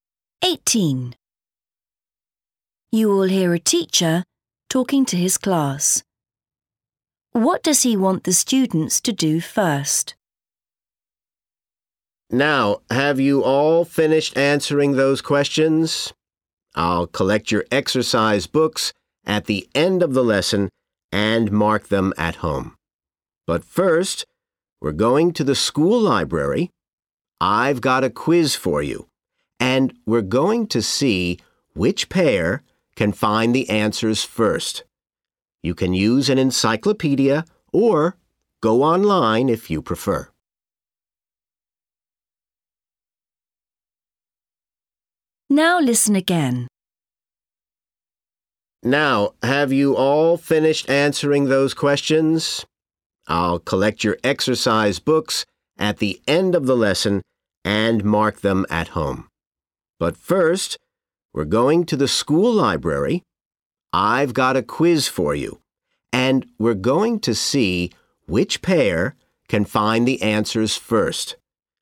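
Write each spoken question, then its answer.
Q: What does he want the students to do first?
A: Go to the school library to do a quiz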